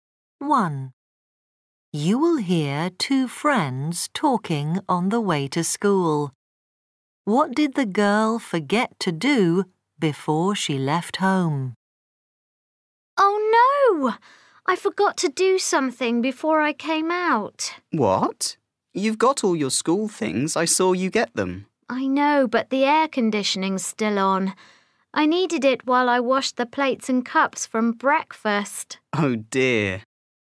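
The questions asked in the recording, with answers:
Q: What did the girl forget to do before she left home?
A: Turn off the air conditioning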